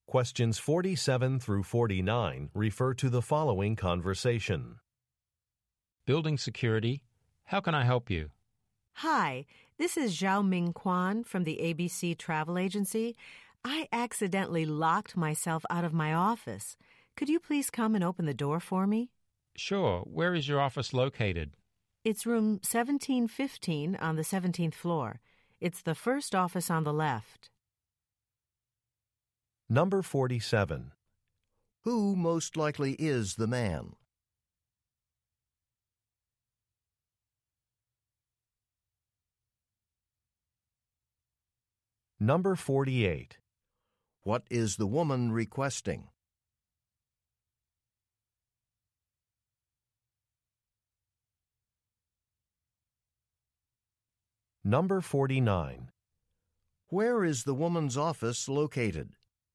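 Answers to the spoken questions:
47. A building security worker
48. To have her office door opened
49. Room 1715 on the 17th floor, first office on the left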